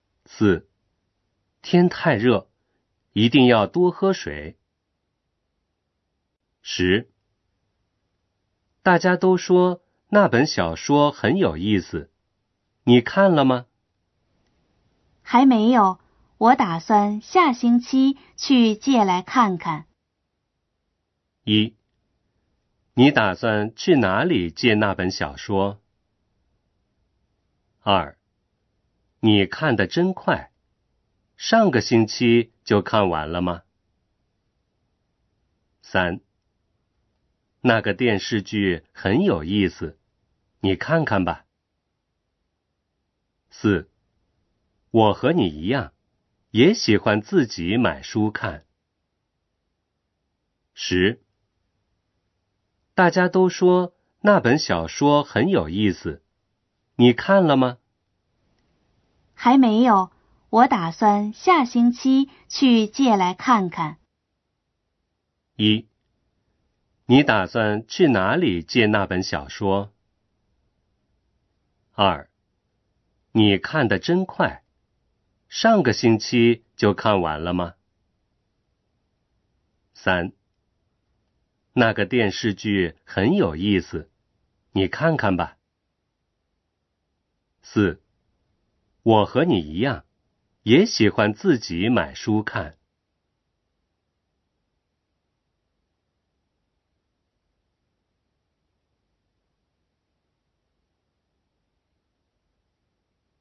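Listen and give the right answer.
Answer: 一: 你打算去哪里借那本小说?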